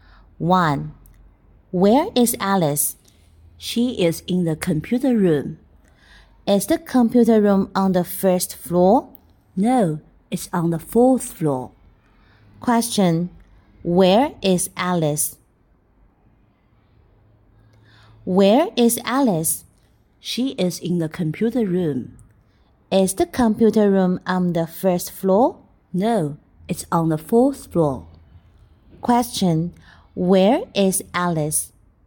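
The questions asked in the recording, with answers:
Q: where is Alice?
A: In the computer room, on the fourth floor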